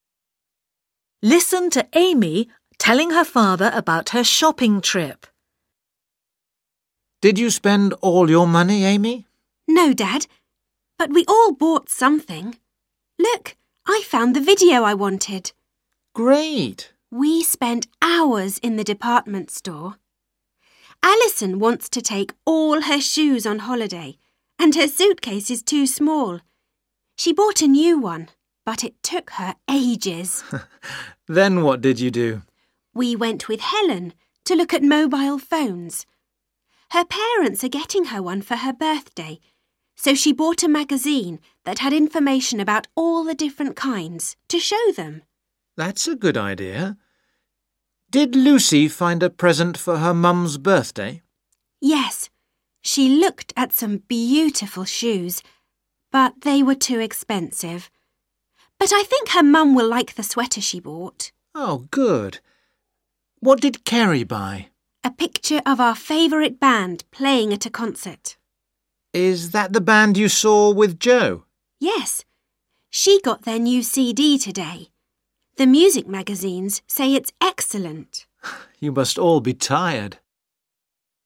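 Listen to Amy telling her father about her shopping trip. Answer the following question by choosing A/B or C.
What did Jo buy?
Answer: a CD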